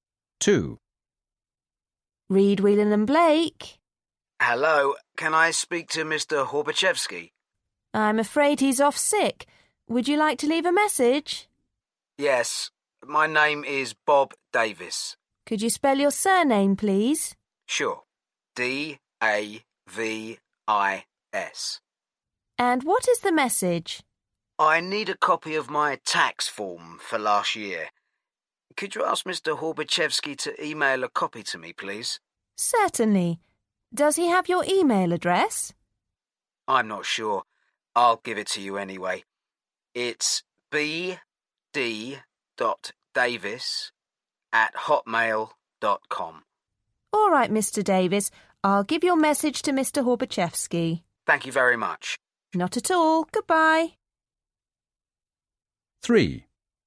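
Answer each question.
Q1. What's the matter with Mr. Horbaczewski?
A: He is off sick

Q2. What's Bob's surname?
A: Davis

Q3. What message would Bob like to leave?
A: He needs a copy of his tax form for last year emailed to him

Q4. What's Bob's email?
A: bd.davis@hotmail.com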